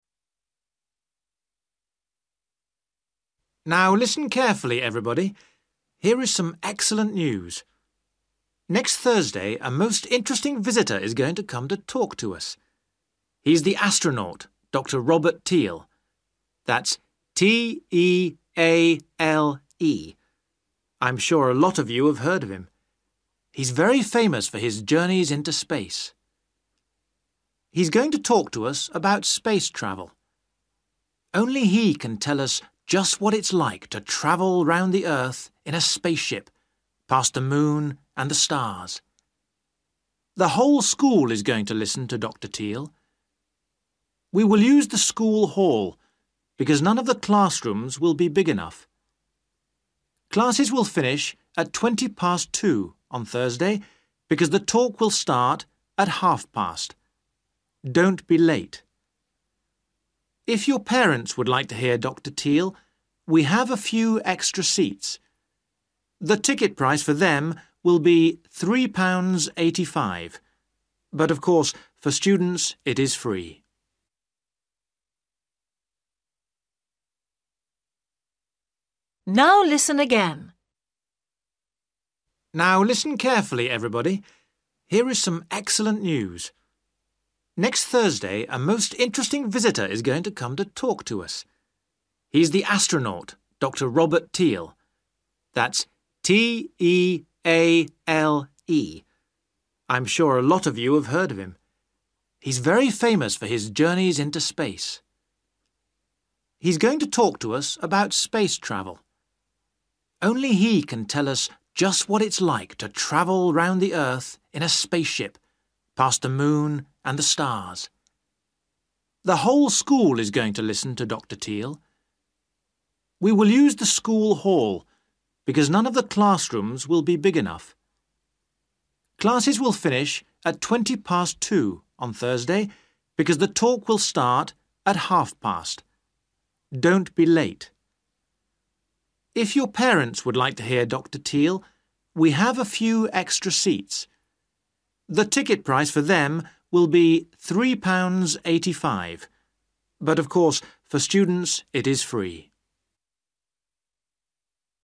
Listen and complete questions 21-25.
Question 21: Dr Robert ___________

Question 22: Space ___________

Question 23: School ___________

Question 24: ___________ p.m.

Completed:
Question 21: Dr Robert Teale
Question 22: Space travel
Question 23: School hall
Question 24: 2.30 / 14.30 / two thirty / half past two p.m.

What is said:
Man: Now listen carefully, everybody. Here is some excellent news. Next Thursday a most interesting visitor is going to come to talk to us. He is the astronaut Dr Robert Teale, that's T E A L E. I'm sure a lot of you have heard of him. He's very famous for his journeys into space.
He's going to talk to us about space travel. Only he can tell us just what it's like to travel round the earth in a spaceship, past the moon and the stars.
The whole school is going to listen to Dr Teale. We will use the school hall because none of the classrooms will be big enough. Classes will finish at twenty past two on Thursday because the talk will start at half past. Don't be late.
If your parents would like to hear Dr Teale, we have a few extra seats. The ticket price for them will be three pounds eighty-five, but of course for students it is free.

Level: A2